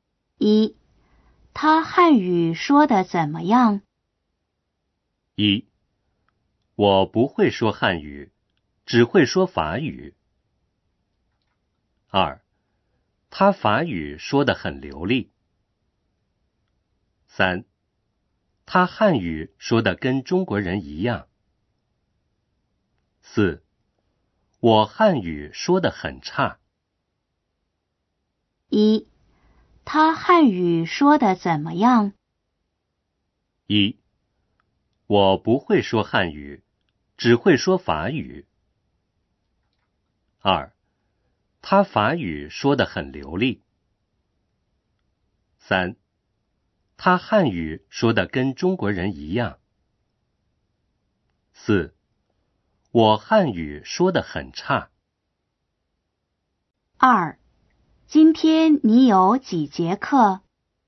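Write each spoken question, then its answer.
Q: 他汉语说得怎么样?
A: 三: 他汉语说得跟中国人一样。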